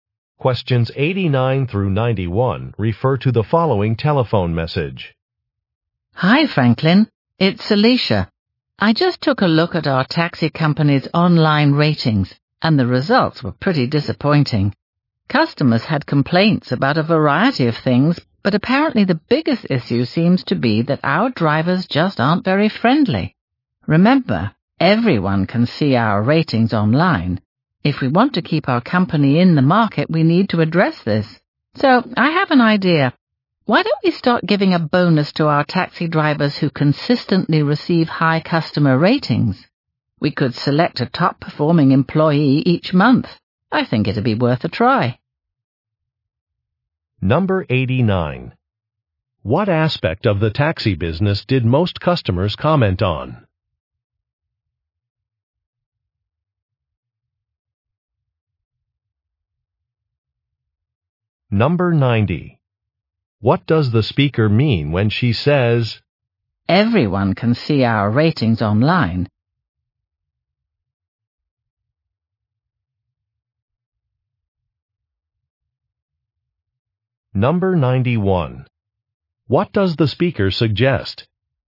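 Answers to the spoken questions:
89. Drivers' unfriendliness
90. The bad ratings could hurt the business
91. Giving bonuses to highly rated drivers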